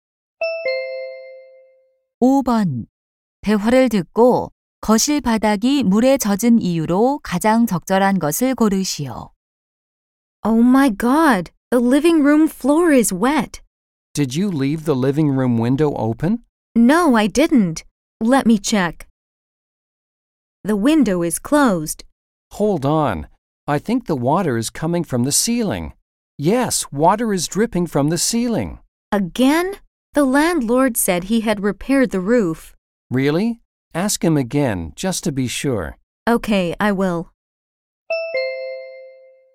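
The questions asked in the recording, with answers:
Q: 대화를 듣고 거실 바닥이 물에 젖은 이유로 가장 적절한 것을 고르시오.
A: 천장(지붕)에서 물이 새서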